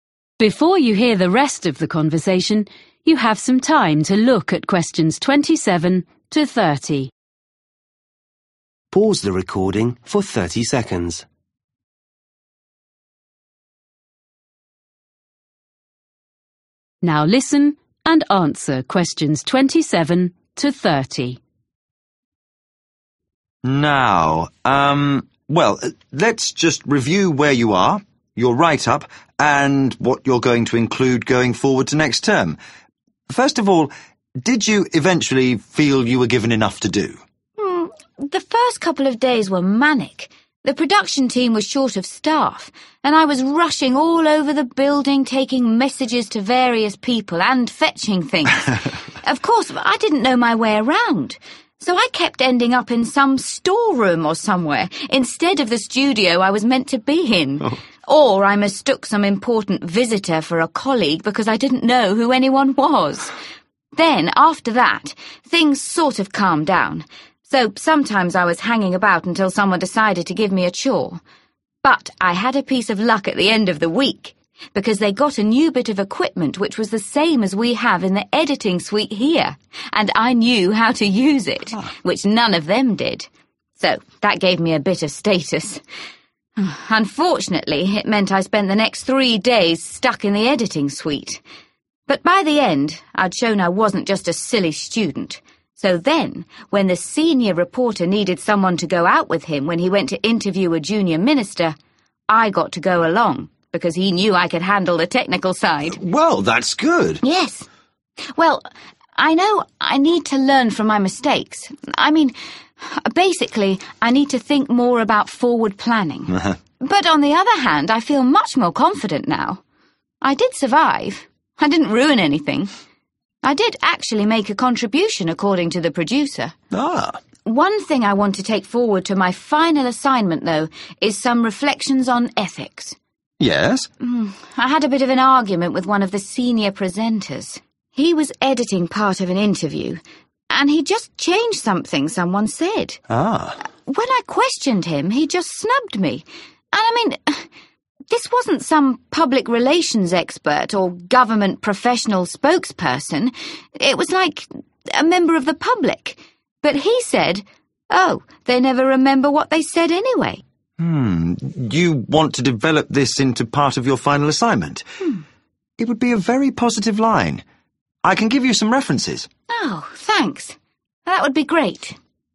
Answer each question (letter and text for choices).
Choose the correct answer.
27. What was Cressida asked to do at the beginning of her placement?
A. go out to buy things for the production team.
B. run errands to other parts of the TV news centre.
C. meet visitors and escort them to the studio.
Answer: B. run errands to other parts of the TV news centre.

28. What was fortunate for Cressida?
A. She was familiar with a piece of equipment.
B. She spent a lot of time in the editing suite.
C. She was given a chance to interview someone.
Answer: A. She was familiar with a piece of equipment.

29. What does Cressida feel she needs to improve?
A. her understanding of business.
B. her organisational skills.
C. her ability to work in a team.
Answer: B. her organisational skills.

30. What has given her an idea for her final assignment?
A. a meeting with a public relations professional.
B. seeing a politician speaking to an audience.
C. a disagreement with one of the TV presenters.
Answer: C. a disagreement with one of the TV presenters.